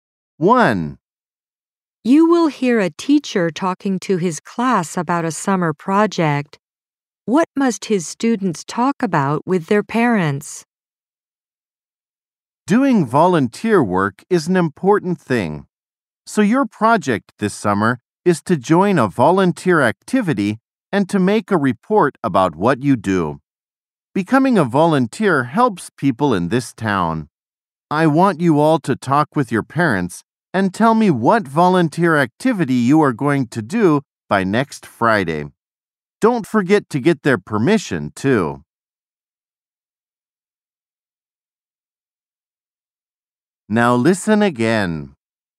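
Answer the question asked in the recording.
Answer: What volunteer activity they are going to do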